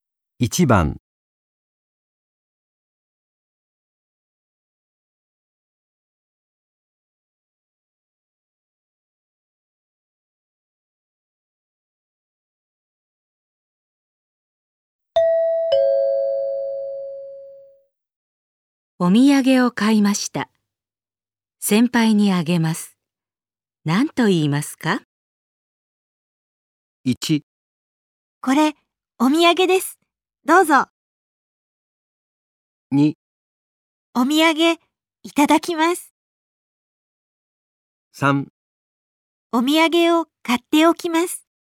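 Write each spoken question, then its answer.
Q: お土産を買いました。先輩にあげます。何と言いますか?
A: 1: これ、お土産です。どうぞ。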